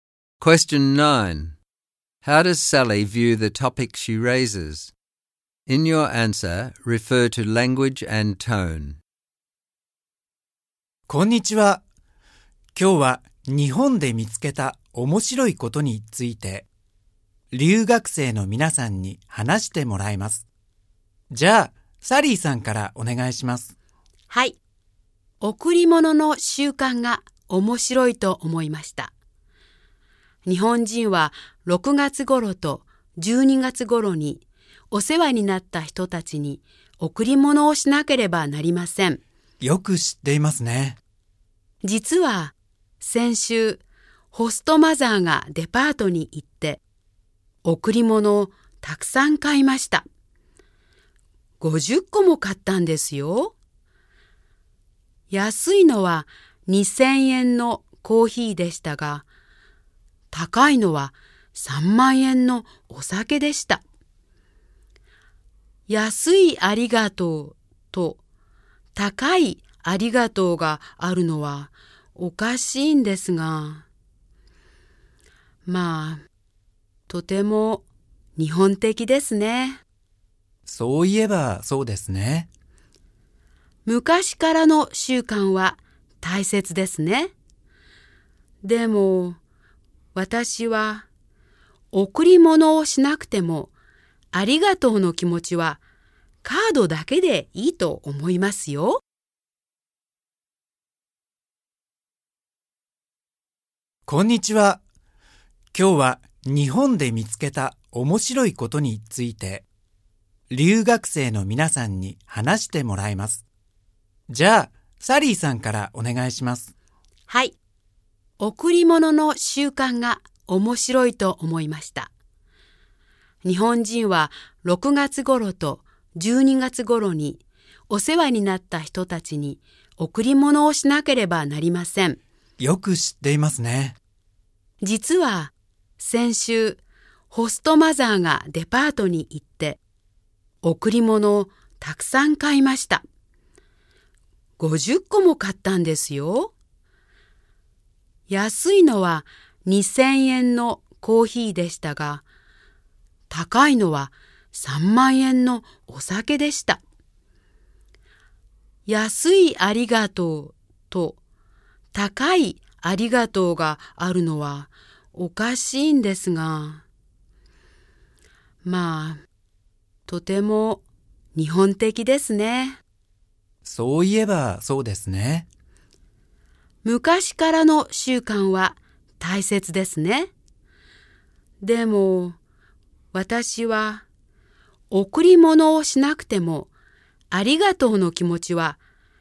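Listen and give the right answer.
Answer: She finds Japan's gift-giving custom interesting but a bit strange, especially the 'cheap thank-you' and 'expensive thank-you'. She is polite about it, but she thinks a card is enough to say thank you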